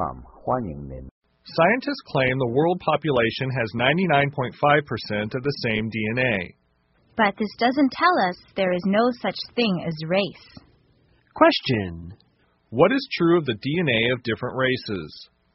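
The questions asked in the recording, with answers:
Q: What is true of the DNA of different races?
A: About 99.5% of it is the same across the world's population.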